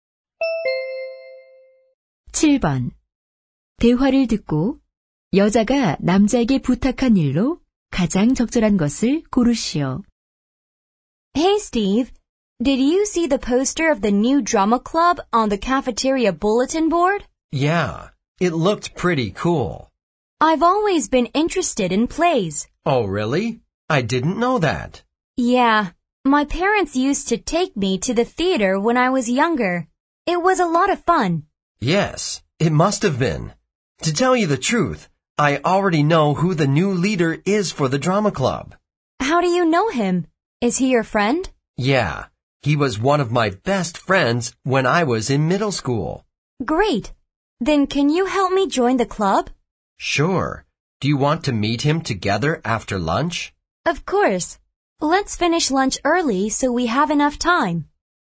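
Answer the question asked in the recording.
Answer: 연극 동아리 가입을 도와주기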